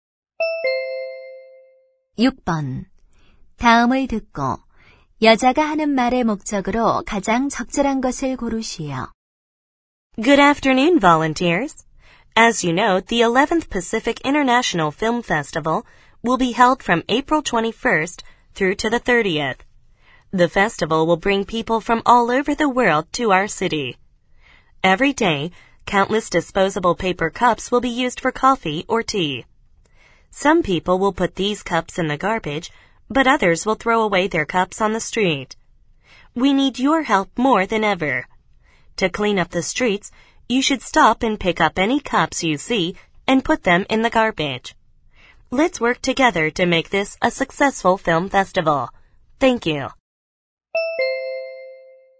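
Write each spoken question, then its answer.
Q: 다음을 듣고 여자가 하는 말의 목적으로 가장 적절한 것을 고르시오.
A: 거리의 종이컵을 주워 달라고 부탁하려고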